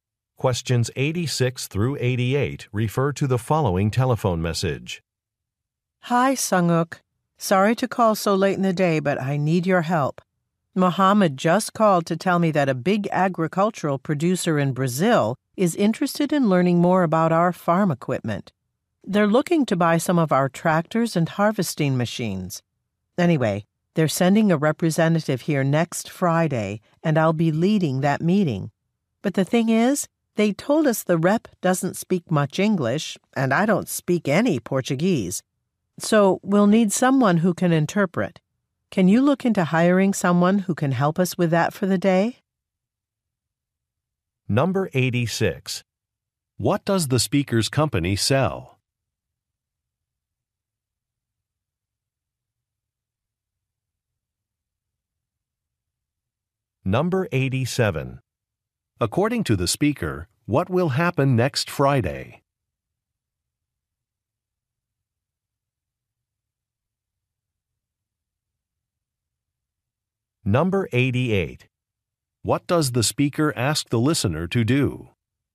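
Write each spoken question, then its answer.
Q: What does the speaker's company sell?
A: Farm equipment

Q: According to the speaker, what will happen next Friday?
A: A client representative will visit

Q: What does the speaker ask the listener to do?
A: Hire an interpreter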